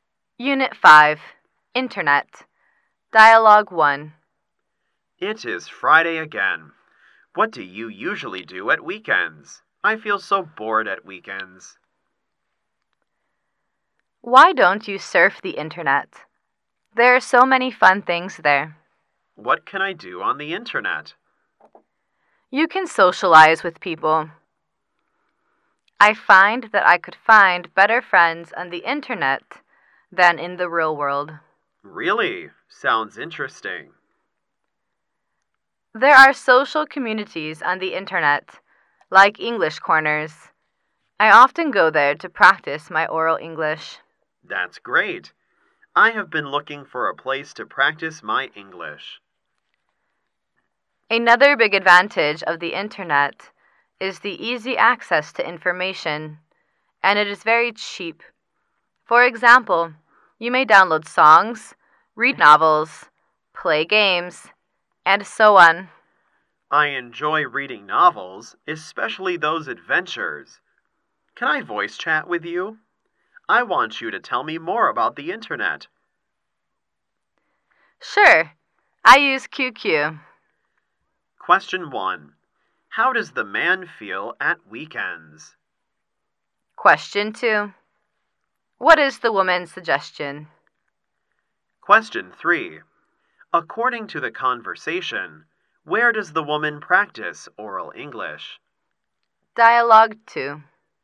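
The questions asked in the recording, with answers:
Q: How does the man feel at weekends?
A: Bored

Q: What is the woman's suggestion?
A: To surf the Internet

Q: According to the conversation, where does the woman practice oral English?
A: In English corners on the Internet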